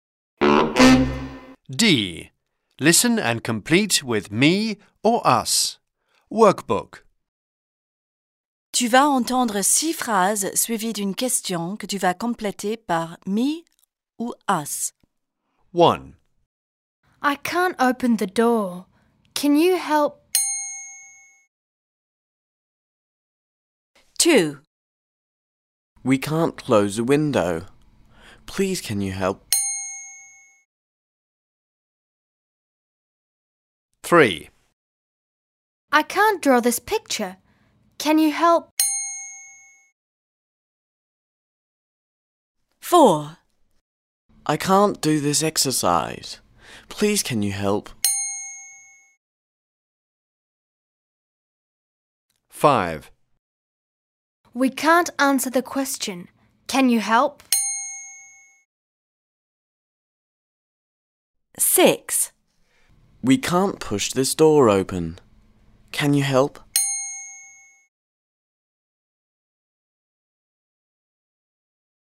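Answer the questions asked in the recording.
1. me
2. us
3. me
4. me
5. us
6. us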